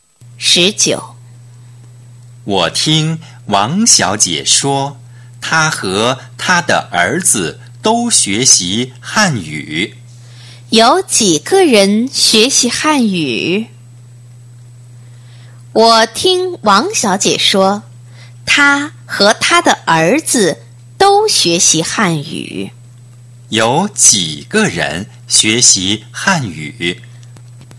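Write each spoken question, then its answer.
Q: 有几个人学习汉语?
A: 两个人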